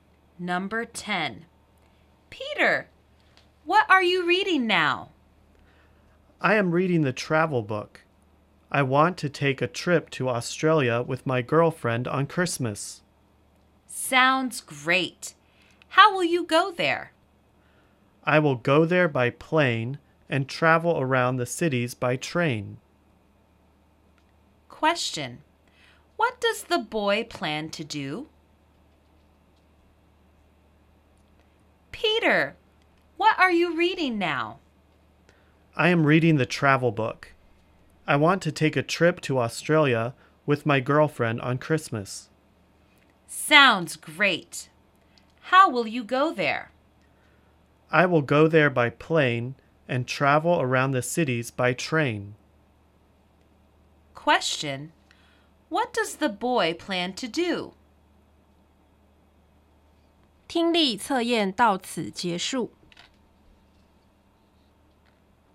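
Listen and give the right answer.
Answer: Take a trip to Australia with his girlfriend at Christmas.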